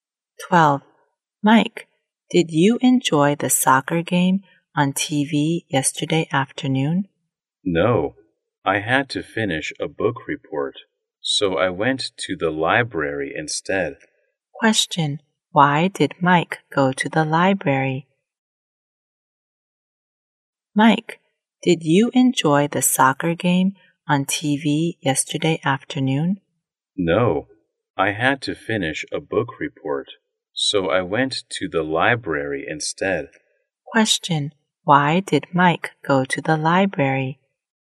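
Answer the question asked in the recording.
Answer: To finish a book report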